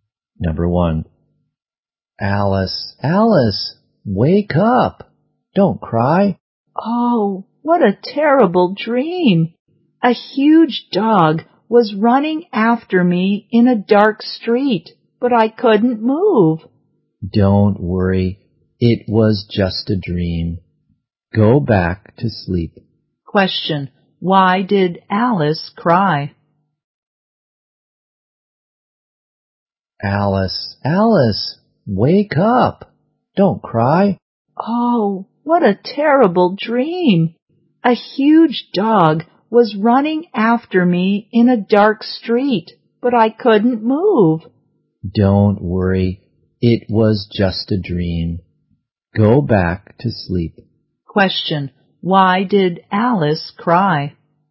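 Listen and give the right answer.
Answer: She had a terrible dream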